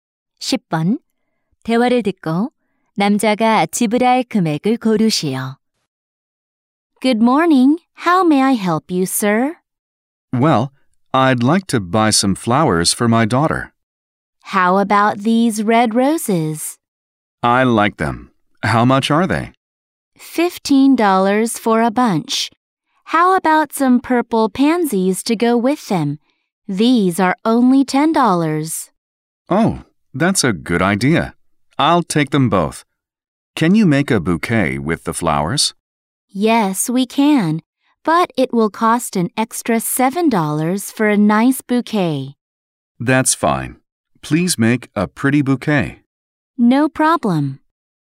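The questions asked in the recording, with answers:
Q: 대화를 듣고 남자가 지불할 금액을 고르시오.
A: 32달러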